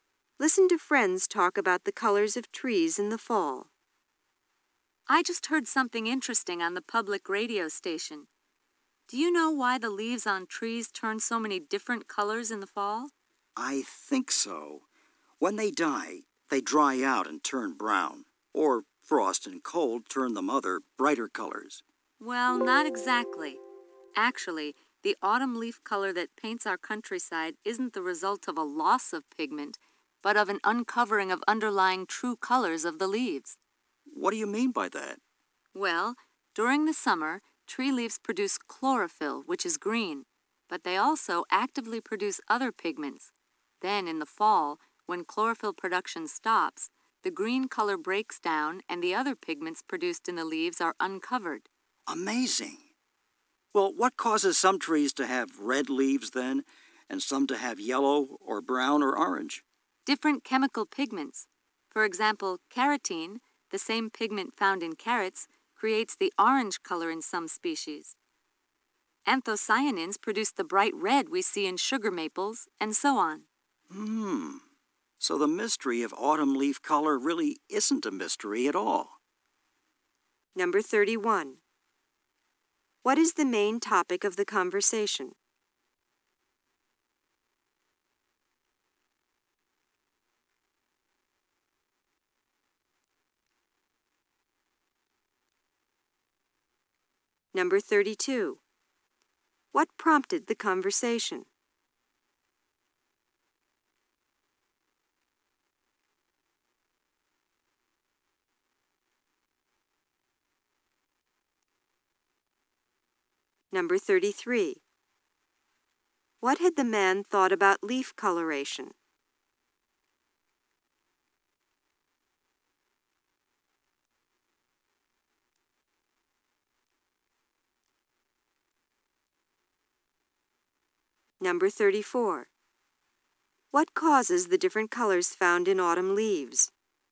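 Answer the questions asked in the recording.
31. Why tree leaves change color in the fall
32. Something the woman heard on the public radio station
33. That leaves dry out and turn brown when they die, or frost and cold turn them brighter colors
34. Different chemical pigments uncovered when chlorophyll breaks down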